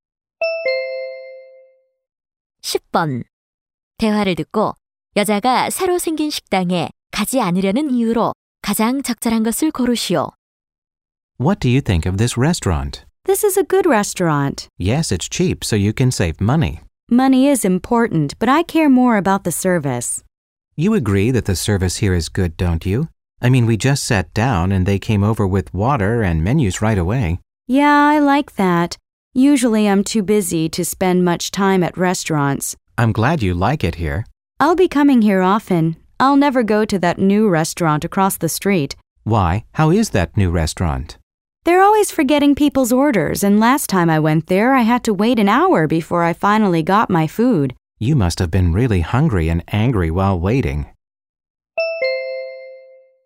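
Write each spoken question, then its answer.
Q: 대화를 듣고 여자가 새로 생긴 식당에 가지 않으려는 이유로 가장 적절한 것을 고르시오.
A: 서비스가 나빠서 (주문을 잊고 음식이 늦게 나옴)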